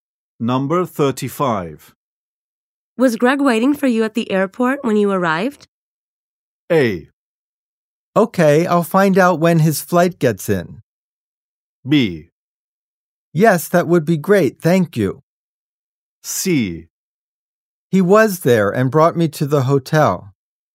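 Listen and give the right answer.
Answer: C: He was there and brought me to the hotel.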